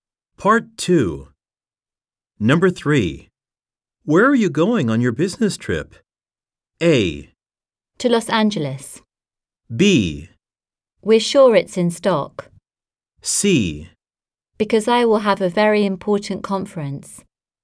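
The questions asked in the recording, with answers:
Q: Where are you going on your business trip?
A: A: To Los Angeles.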